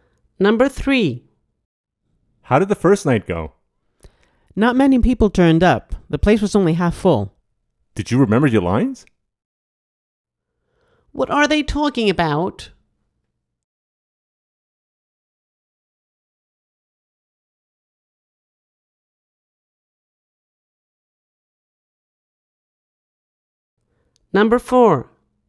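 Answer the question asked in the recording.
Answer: A play's first night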